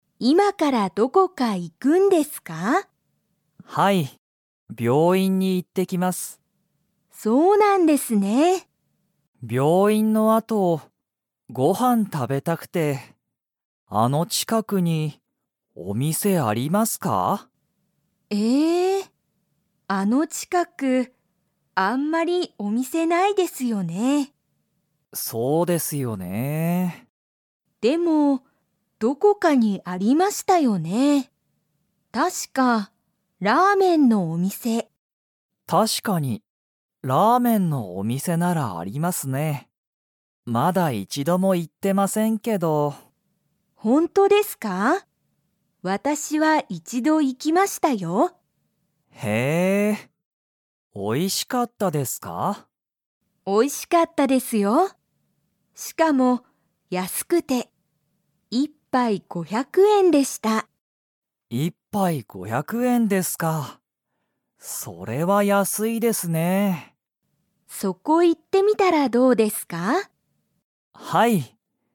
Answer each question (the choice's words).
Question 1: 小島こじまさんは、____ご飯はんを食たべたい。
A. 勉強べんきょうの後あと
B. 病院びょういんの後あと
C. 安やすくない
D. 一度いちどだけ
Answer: 病院びょういんの後あと

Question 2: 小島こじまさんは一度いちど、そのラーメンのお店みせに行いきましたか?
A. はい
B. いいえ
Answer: いいえ

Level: Level 2